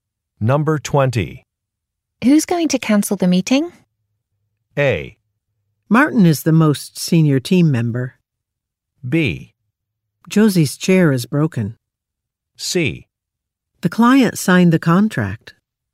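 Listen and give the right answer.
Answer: A: Martin is the most senior team member.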